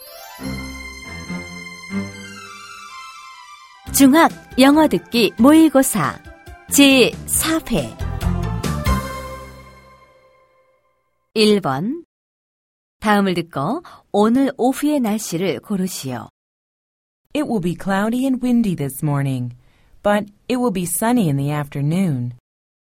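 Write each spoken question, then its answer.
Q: 다음을 듣고 오늘 오후의 날씨를 고르시오.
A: 맑음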